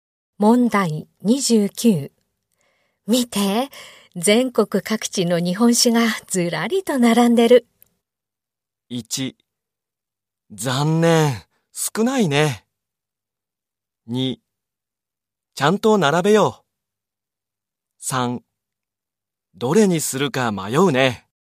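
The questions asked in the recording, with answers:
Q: 見て、全国各地の日本酒がずらりと並んでる。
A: 3: どれにするか迷うね。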